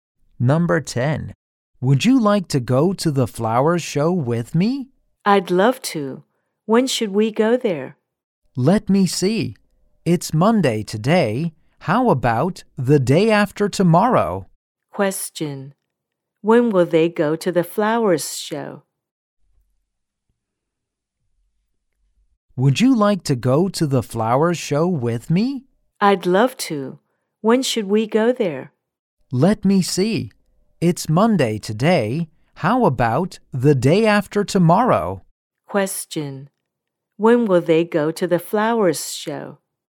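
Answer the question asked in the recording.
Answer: On Wednesday.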